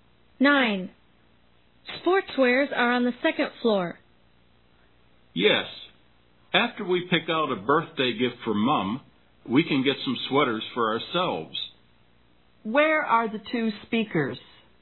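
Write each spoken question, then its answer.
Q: Where are the two speakers?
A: In a department store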